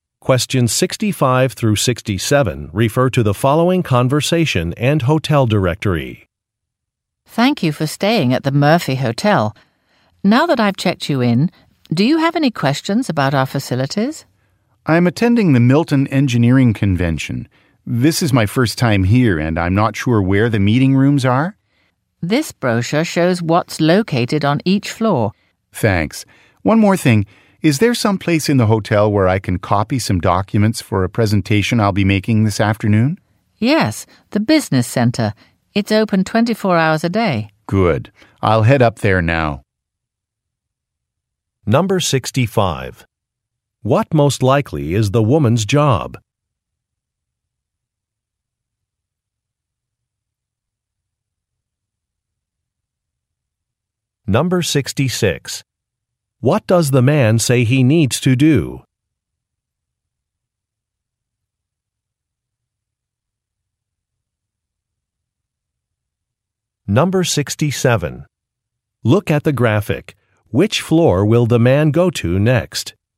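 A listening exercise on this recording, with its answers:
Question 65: What most likely is the woman's job?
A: Front-desk clerk

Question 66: What does the man say he needs to do?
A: Make some copies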